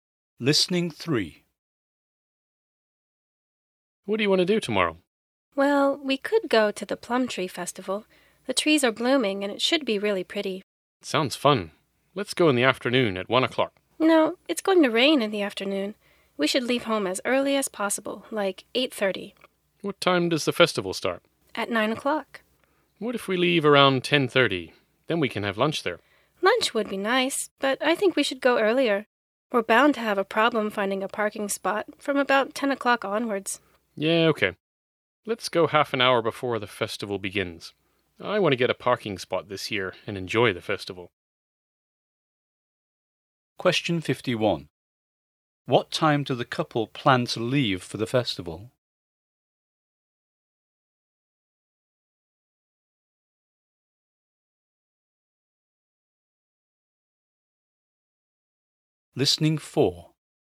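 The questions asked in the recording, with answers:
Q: What time do the couple plan to leave for the festival?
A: At 8:30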